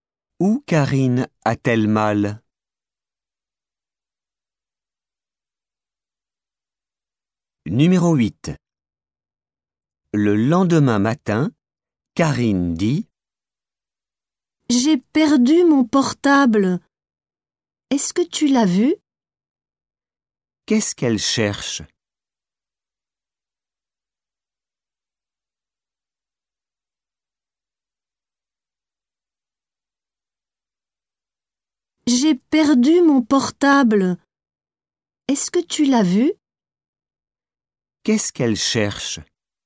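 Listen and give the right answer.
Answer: Son portable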